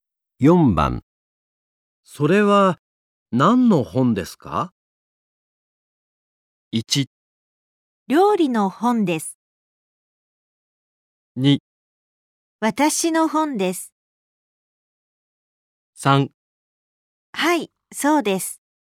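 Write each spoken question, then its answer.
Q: それは何の本ですか?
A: 1: 料理の本です。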